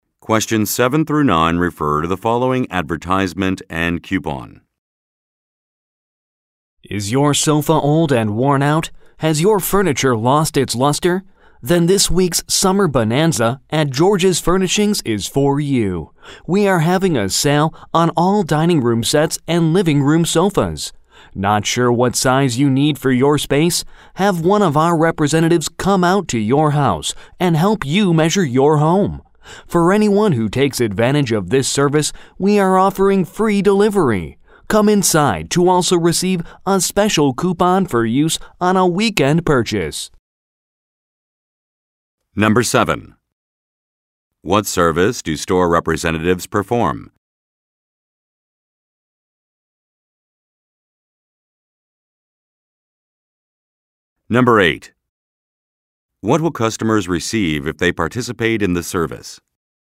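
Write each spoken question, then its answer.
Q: What service do store representatives perform?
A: They come to customers' houses to help measure their homes.

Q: What will customers receive if they participate in the service?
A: Free delivery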